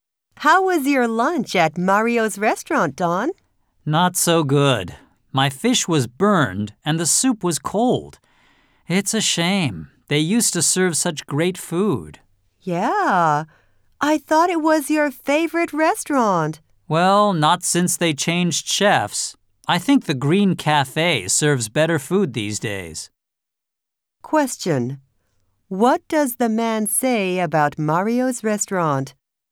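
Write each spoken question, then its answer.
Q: What does the man say about Mario's restaurant?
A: Its food was bad (burned fish, cold soup); it has gotten worse since the chef changed.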